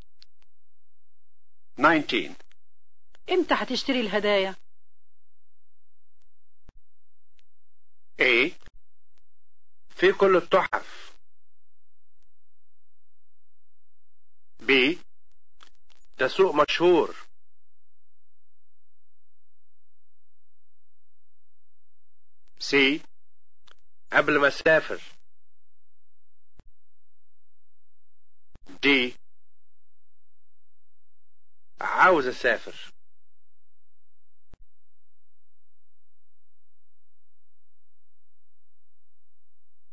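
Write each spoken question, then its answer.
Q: امتى هتشتري الهدايا؟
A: C: قبل ما اسافر.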